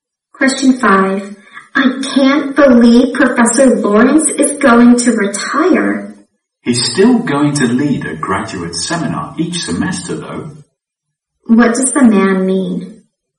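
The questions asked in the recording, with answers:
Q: What does the man mean?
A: Professor Lawrence will still lead a graduate seminar each semester.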